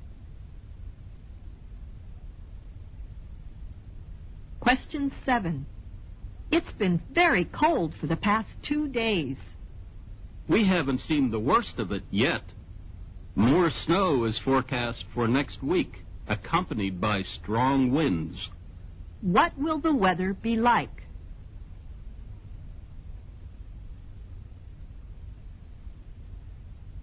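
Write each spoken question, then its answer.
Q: What will the weather be like?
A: Worse: more snow and strong winds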